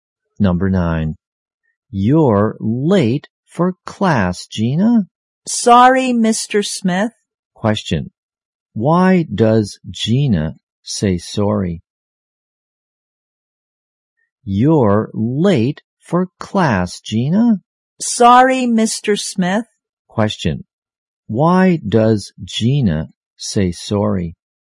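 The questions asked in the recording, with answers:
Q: why does Gina say sorry?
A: Because she is late for class.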